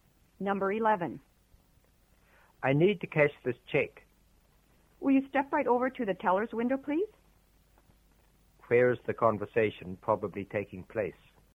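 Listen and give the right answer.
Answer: At a bank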